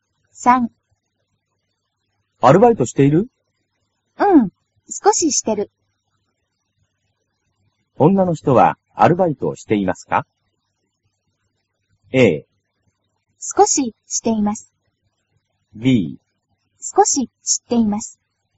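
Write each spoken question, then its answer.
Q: 女の人はアルバイトをしていますか?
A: A: 少ししています。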